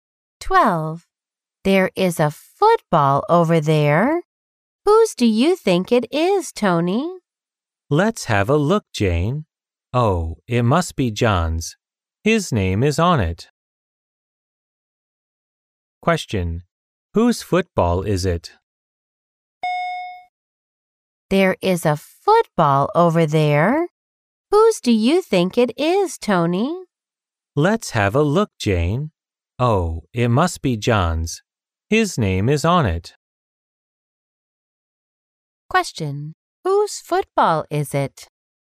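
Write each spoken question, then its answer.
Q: Whose football is it?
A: John's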